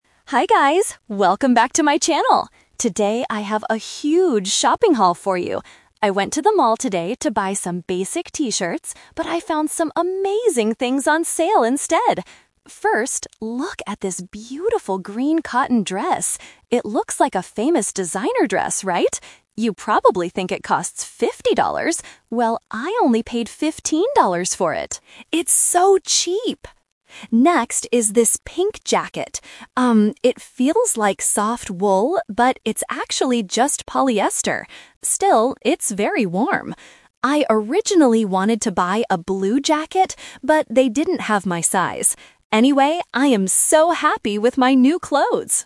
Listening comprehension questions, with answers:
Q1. What did Chloe originally plan to buy at the mall?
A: Some basic T-shirts.

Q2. How much did she pay for the green dress?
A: $15

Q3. Why didn't Chloe buy a blue jacket?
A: The store didn't have her size.

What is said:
Chloe: Hi guys, welcome back to my channel! Today I have a huge shopping haul for you. I went to the mall today to buy some basic T-shirts, but I found some amazing things on sale instead! First, look at this beautiful green cotton dress. It looks like a famous designer dress, right? You probably think it costs fifty dollars. Well, I only paid fifteen dollars for it! It's so cheap! Next is this pink jacket. Um, it feels like soft wool, but it's actually just polyester. Still, it's very warm. I originally wanted to buy a blue jacket, but they didn't have my size. Anyway, I am so happy with my new clothes!

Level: A2